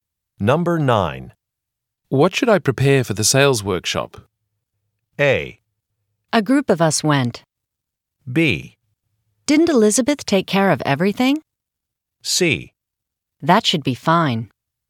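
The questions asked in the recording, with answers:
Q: What should I prepare for the sales workshop?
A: B: Didn't Elizabeth take care of everything?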